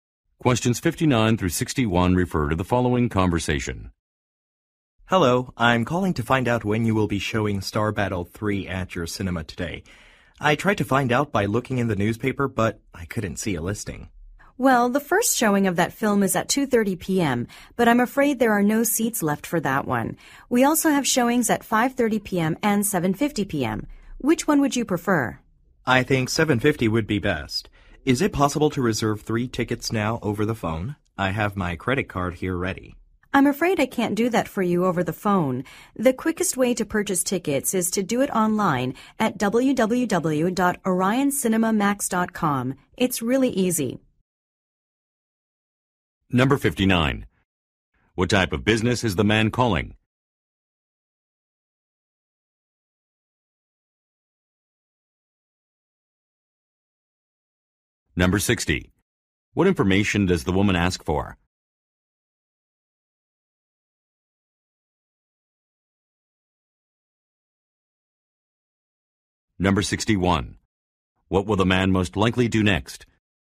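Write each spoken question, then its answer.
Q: What type of business is the man calling?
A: A cinema

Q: What will the man most likely do next?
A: Buy tickets online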